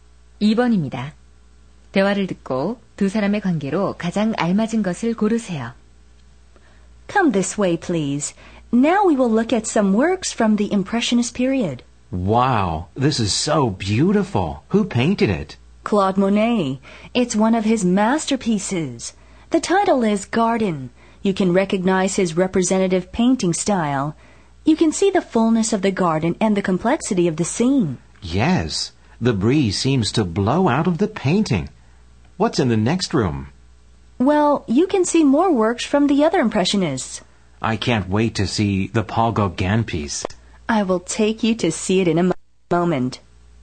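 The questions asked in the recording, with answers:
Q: 대화를 듣고 두 사람의 관계로 가장 알맞은 것을 고르세요.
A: 미술관 안내원과 관람객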